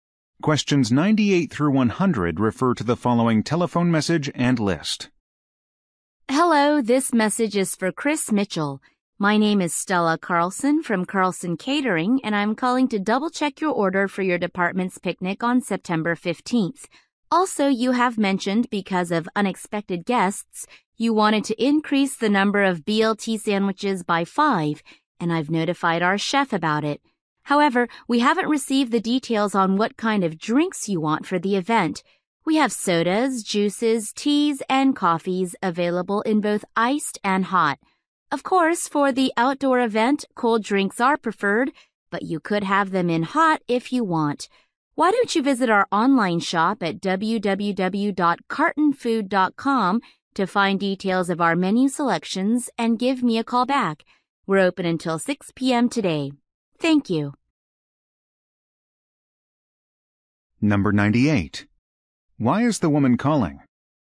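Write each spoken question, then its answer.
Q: Why is the woman calling?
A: To double-check a catering order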